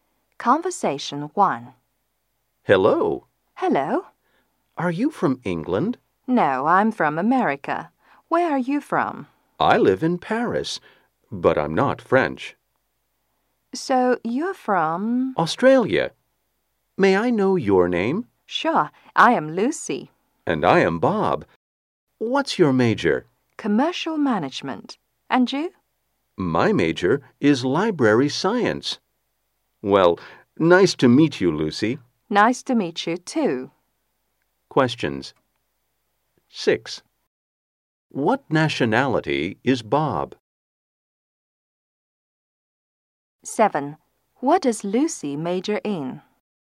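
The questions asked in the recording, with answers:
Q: What nationality is Bob?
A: Australian

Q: What does Lucy major in?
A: Commercial management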